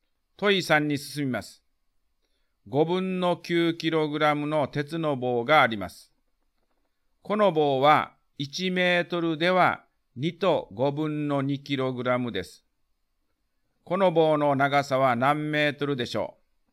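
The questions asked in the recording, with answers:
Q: この棒の長さは何メートルでしょう。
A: 4分の3メートル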